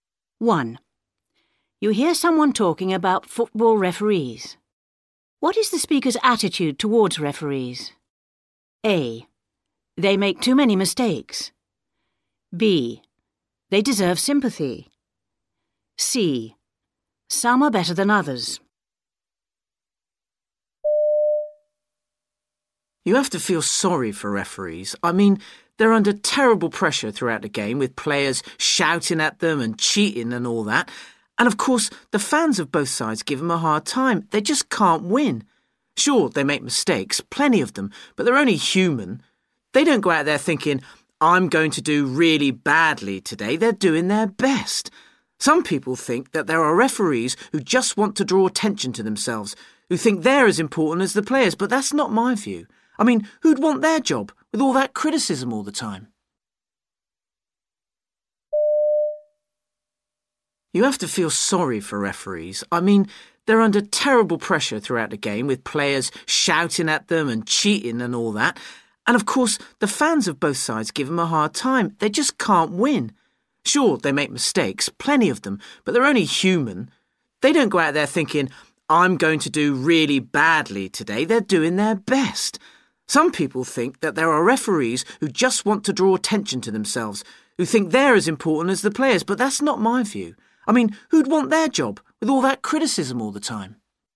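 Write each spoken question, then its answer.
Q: What is the speaker's attitude towards referees?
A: B: They deserve sympathy.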